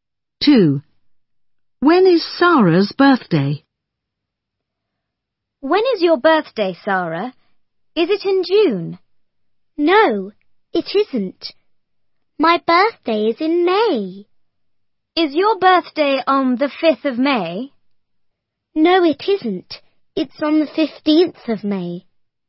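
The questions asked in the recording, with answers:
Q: When is Sarah's birthday?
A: On the 15th of May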